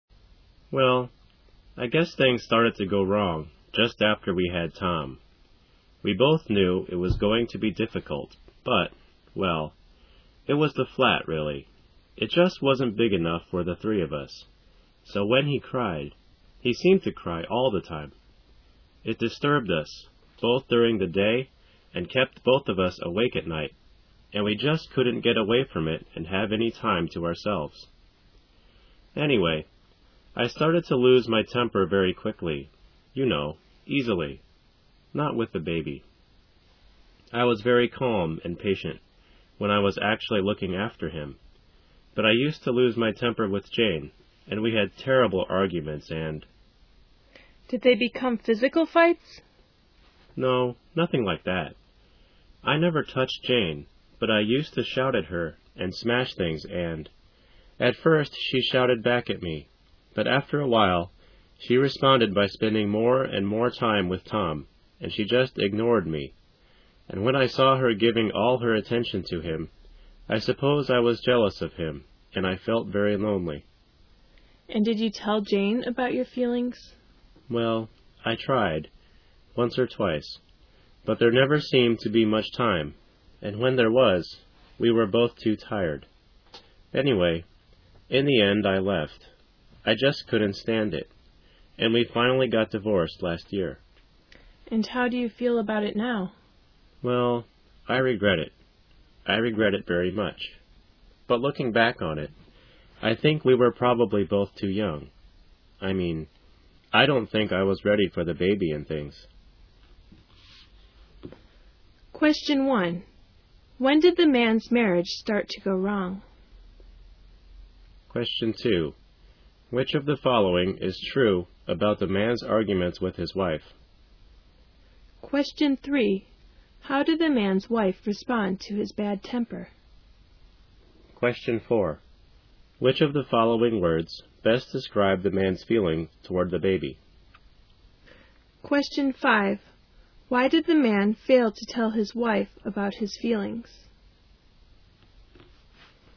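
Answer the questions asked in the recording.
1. Just after they had their baby, Tom
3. At first she shouted back, then she spent more time with Tom and ignored him
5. There never seemed to be much time, and when there was, they were both too tired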